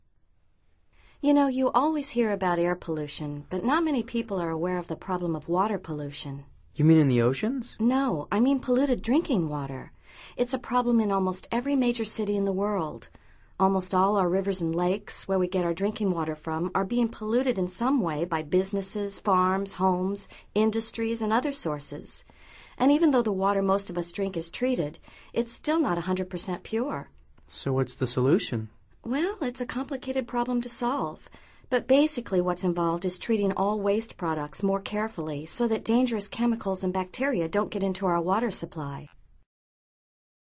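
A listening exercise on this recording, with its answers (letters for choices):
Activity 110: Basándote en los comentarios anteriores, selecciona las opciones más adecuadas. Verifica luego las respuestas correctas.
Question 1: What is the main issue in dialogue #2?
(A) Air pollution.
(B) Water pollution.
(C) Treated water pollution.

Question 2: What can be done to solve problem #2?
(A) Avoid drinking 100 percent pure water.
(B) Treat waste products more carefully.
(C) Destroy bacteria in drinking water.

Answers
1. B
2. B

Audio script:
You know, you always hear about air pollution, but not many people are aware of the problem of water pollution.
You mean in the oceans?
No. I mean polluted drinking water. It's a problem in almost every major city in the world. Almost all our rivers and lakes – where we get our drinking water from – are being polluted in some way by businesses, farms, homes, industries, and other sources. 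And even though the water most of us drink is treated, it's still not 100 percent pure.
So what's the solution?
Well, it's a complicated problem to solve, but basically what's involved is treating all waste products more carefully so that dangerous chemicals and bacteria don't get into our water supply.

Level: Nivel Avanzado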